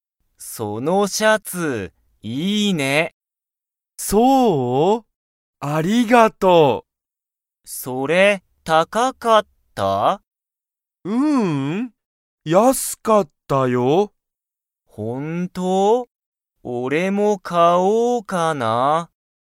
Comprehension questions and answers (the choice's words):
そのシャツは____。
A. 高(たか)かった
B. 安(やす)かった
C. 大おおきかった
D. 小ちいさかった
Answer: 安(やす)かった

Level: Level 1